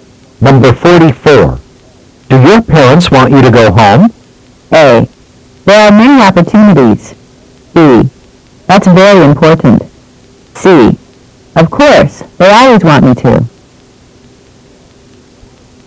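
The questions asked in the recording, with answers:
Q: Do your parents want you to go home?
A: C: Of course, they always want me to.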